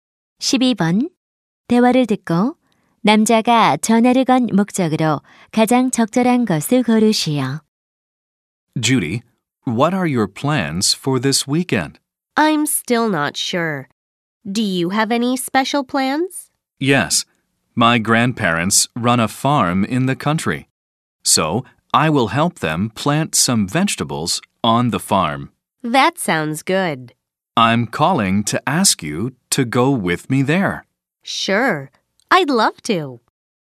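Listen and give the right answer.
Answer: 농장에 함께 가자고 부탁하려고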